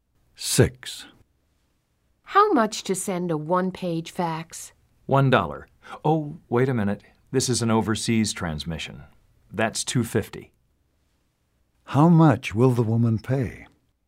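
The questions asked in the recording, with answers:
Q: How much will the woman pay?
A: $2.50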